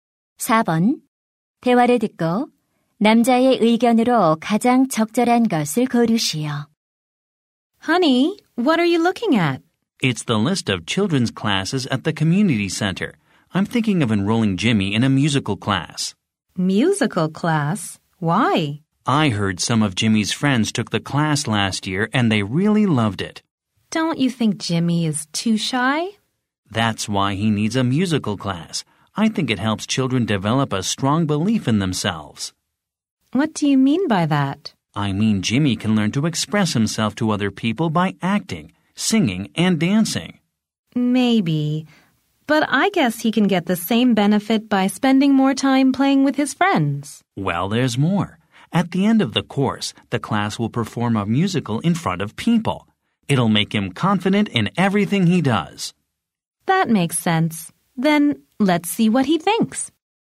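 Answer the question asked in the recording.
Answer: 뮤지컬 수업은 아이의 자신감을 키워 준다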